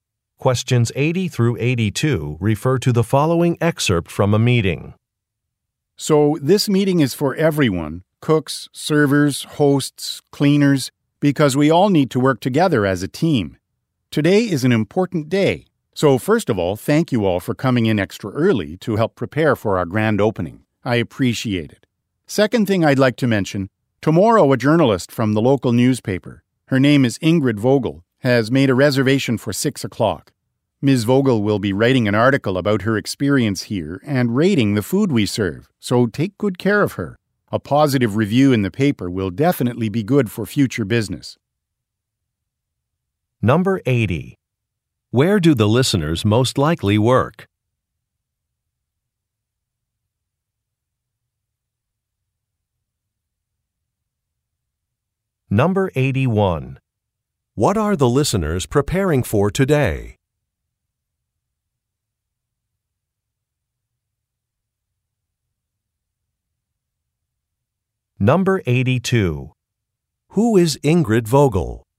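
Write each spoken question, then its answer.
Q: Where do the listeners most likely work?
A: At a restaurant

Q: What are the listeners preparing for today?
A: A grand opening

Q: Who is Ingrid Vogel?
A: A journalist from the local newspaper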